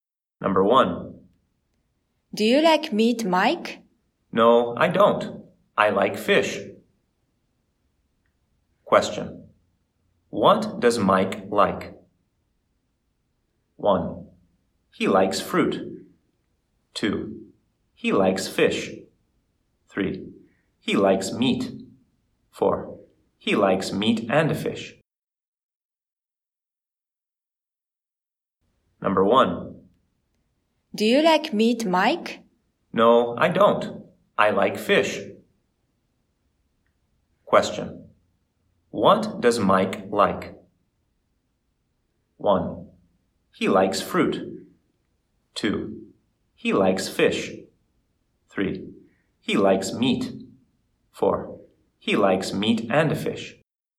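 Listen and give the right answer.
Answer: 2: He likes fish.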